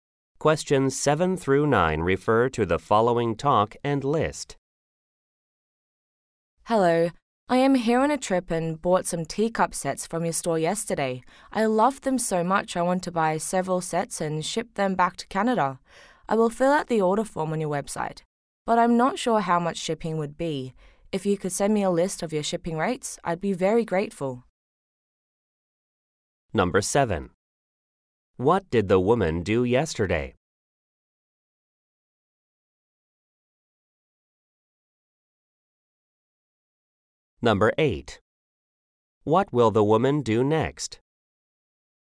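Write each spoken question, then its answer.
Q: What did the woman do yesterday?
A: Bought teacup sets from the store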